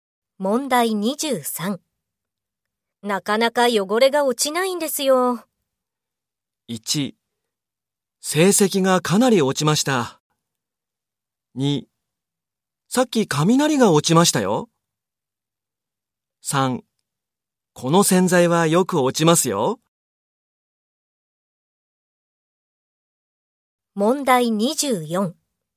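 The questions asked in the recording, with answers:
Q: なかなか汚れが落ちないんですよ。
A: 3: この洗剤はよく落ちますよ。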